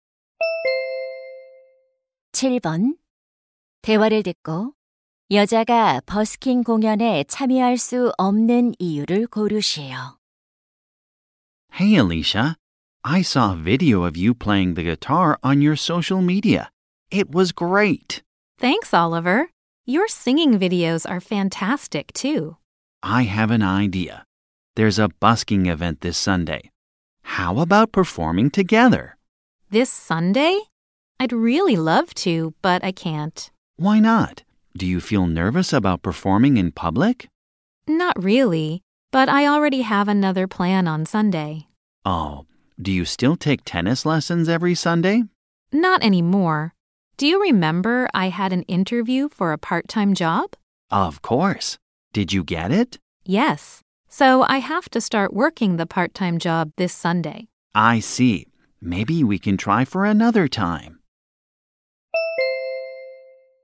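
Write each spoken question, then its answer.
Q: 대화를 듣고 여자가 버스킹 공연에 참여할 수 없는 이유를 고르시오.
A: 아르바이트를 시작해야 해서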